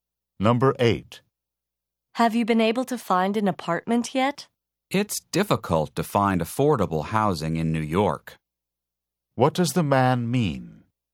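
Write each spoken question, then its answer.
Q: What does the man mean?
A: He hasn't found an affordable apartment yet.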